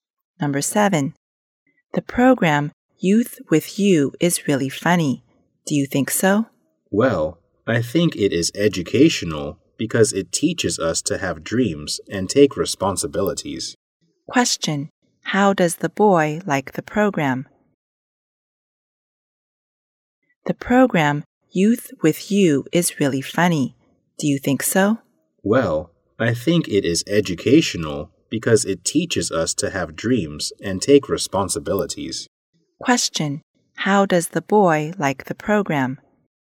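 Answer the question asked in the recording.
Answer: He thinks it is educational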